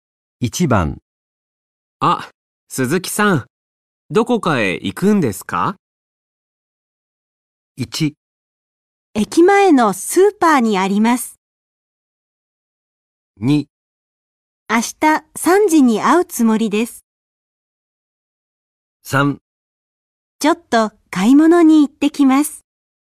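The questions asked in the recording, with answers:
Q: あ、鈴木さん、どこかへ行くんですか?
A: 3: ちょっと買い物に行ってきます。

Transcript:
1
駅前のスーパーにあります。
2
3
ちょっと買い物に行ってきます。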